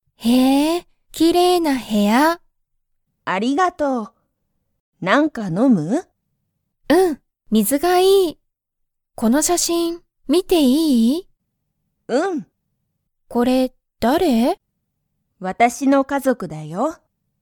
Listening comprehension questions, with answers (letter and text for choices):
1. ミカは、なにか飲(の)みますか?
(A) はい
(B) いいえ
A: (A) はい

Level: Level 1